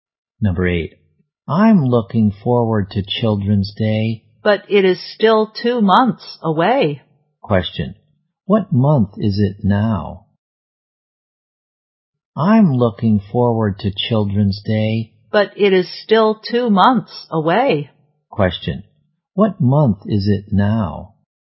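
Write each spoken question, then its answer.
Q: Question. What month is it now?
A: April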